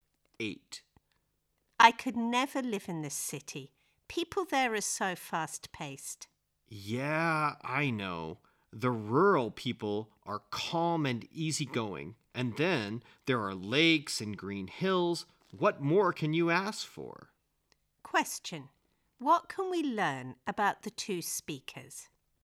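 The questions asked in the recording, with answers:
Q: What can we learn about the two speakers?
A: They both prefer rural life to city life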